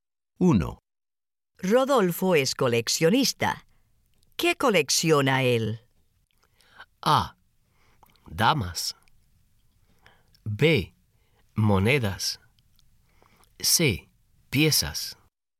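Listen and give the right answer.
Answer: B: Monedas.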